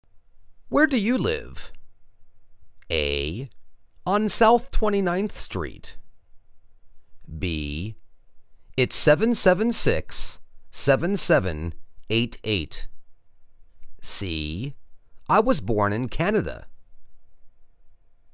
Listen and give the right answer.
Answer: On South 29th Street.